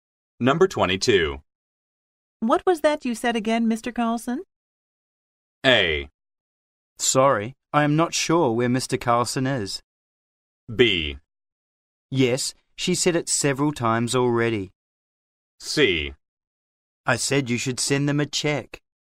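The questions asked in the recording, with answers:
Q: What was that you said again, Mr.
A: C: I said you should send them a check.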